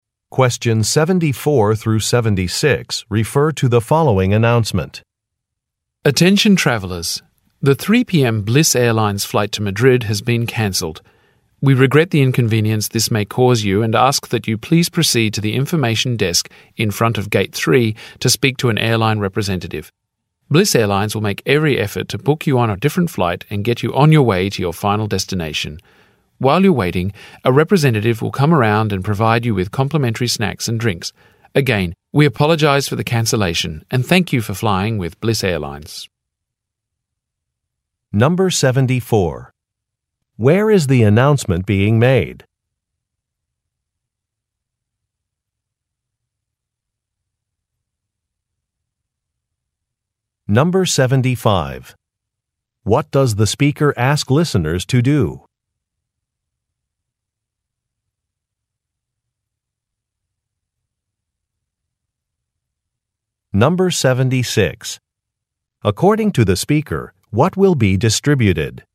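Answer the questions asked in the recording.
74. At an airport
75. Go to the information desk in front of Gate 3
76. Free snacks and drinks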